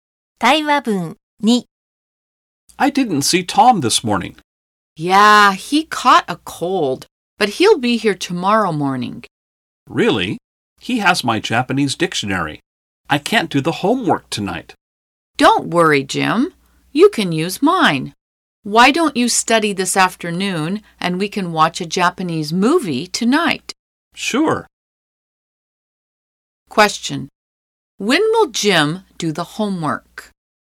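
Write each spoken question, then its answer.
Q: When will Jim do the homework?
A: This afternoon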